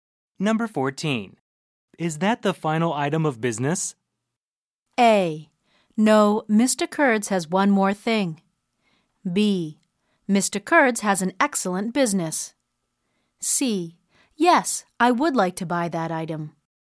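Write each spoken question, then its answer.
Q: Is that the final item of business?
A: A: No, Mr. Kurds has one more thing.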